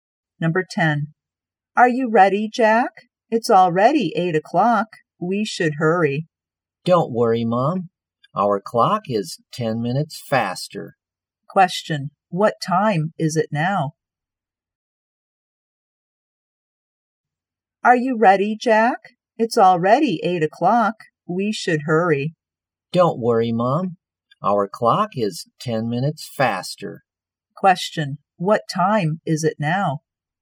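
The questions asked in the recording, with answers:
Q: What time is it now?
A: 7:50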